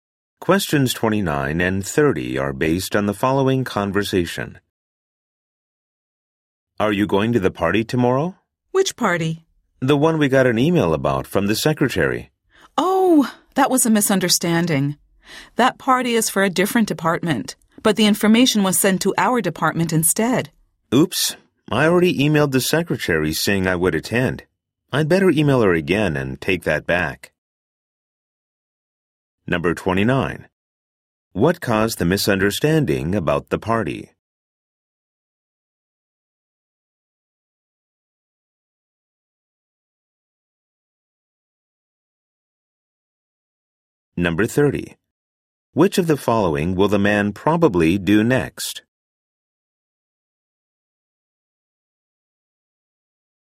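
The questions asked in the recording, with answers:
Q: What caused the misunderstanding about the party?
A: The information was sent to the wrong department

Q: Which of the following will the man probably do next?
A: Email the secretary to cancel his attendance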